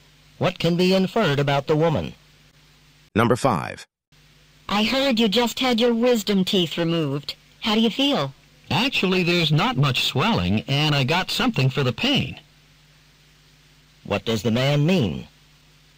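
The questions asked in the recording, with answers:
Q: What does the man mean?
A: He feels fairly well.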